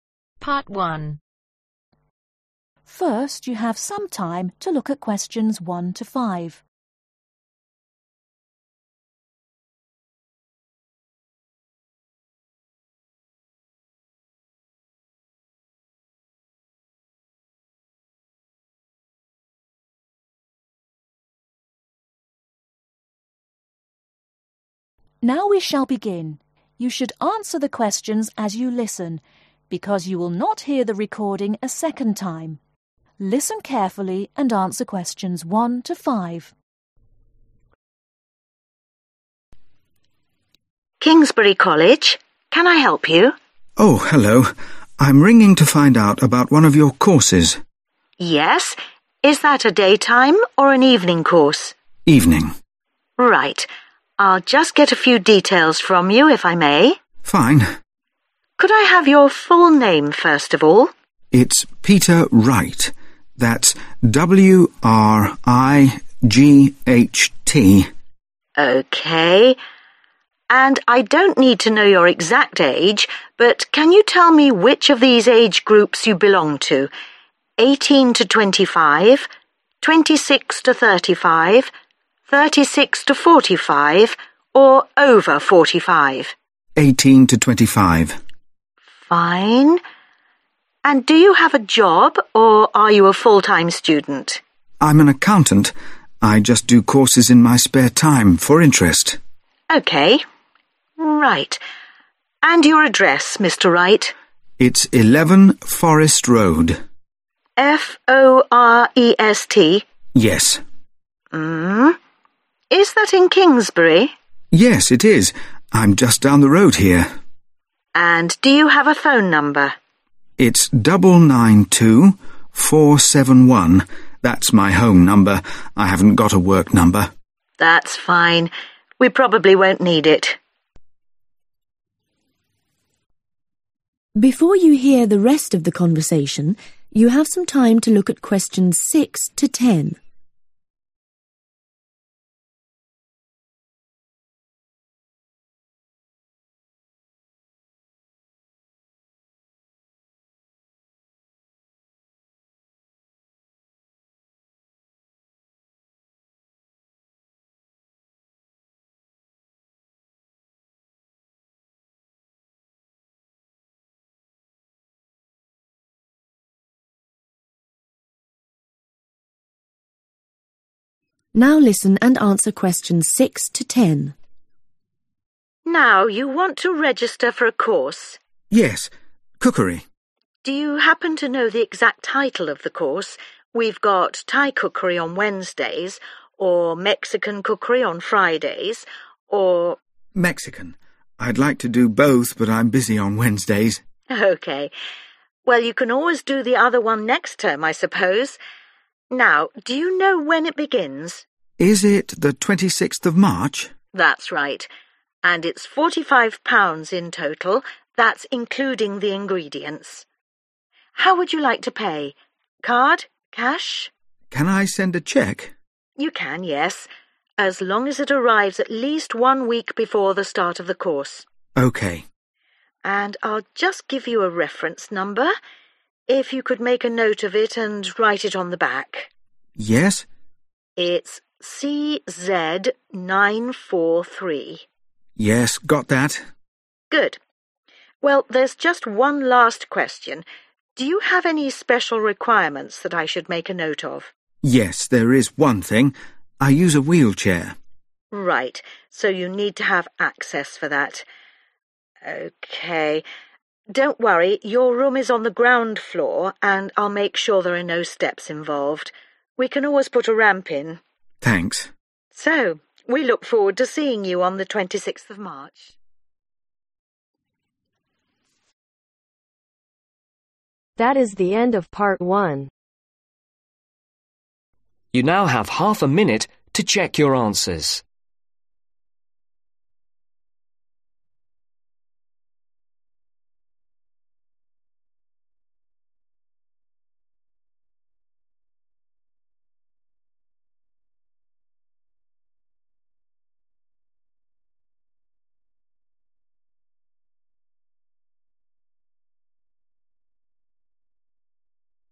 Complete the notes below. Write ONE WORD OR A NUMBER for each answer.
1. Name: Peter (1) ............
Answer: WRIGHT

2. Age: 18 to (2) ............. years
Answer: 25

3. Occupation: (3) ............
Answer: ACCOUNTANT

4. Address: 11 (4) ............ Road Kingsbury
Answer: FOREST

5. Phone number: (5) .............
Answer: 992471

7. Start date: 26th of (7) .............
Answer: MARCH

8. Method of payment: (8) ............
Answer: BY CHEQUE

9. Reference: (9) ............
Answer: CZ943

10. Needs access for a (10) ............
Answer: WHEELCHAIR